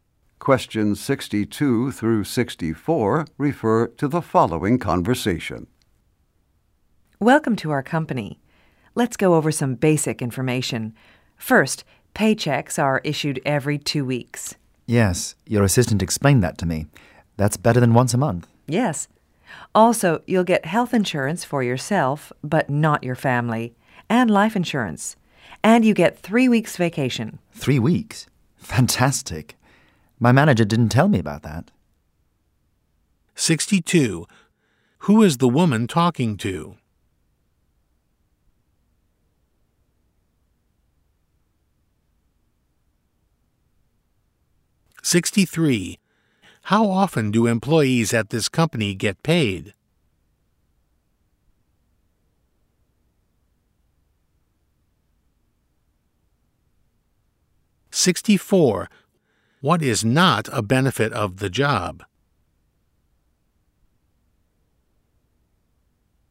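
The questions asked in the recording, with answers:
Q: How often do employees at this company get paid?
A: Every two weeks

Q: What is not a benefit of the job?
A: Health insurance for the family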